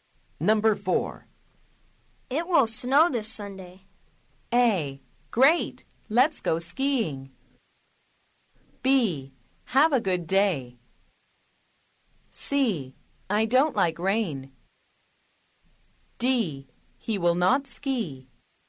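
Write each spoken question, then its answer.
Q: It will snow this Sunday.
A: A: Great, let's go skiing.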